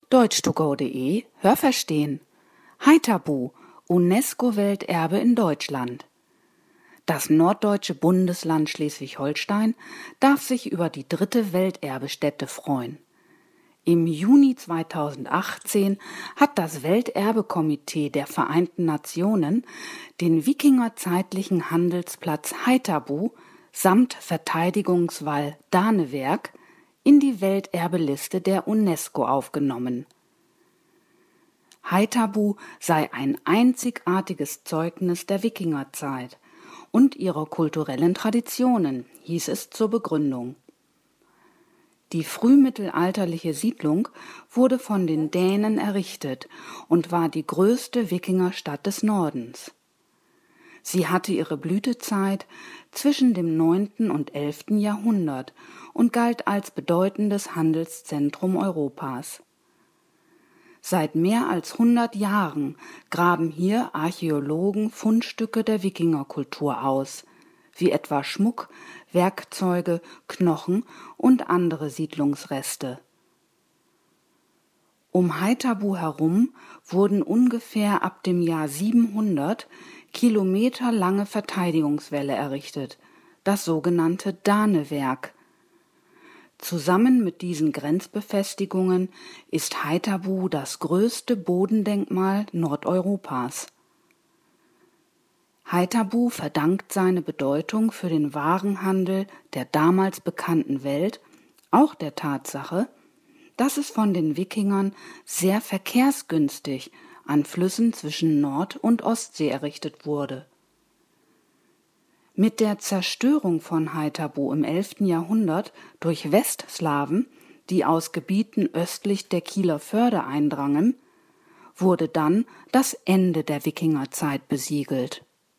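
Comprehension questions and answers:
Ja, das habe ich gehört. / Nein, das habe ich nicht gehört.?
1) Das norddeutsche Bundesland Schleswig-Holstein hat nun drei UNESCO-Welterbestätten.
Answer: Ja, das habe ich gehört.

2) Die Siedlung wurde von den Dänen erbaut und war die zweitgrößte Wikingerstadt des Nordens.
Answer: Nein, das habe ich nicht gehört.

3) Die Hochzeit des Warenhandels in Haithabu war zwischen dem 9. und 11. Jahrhundert.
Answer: Ja, das habe ich gehört.

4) Seit dem Mittelalter graben Archäologen dort Zeugnisse der Wikingerkultur aus.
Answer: Nein, das habe ich nicht gehört.

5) Die Befestigungen des sogenannten Danewerks befinden sich im Inneren von Haithabu.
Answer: Nein, das habe ich nicht gehört.

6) Haithabu und das Danewerk sind zusammen das größte Bodendenkmal Nordeuropas.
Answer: Ja, das habe ich gehört.

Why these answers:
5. Es sind Verteidigungs- bzw. Grenzwälle, die um die Siedlung herum gebaut wurden.

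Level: C2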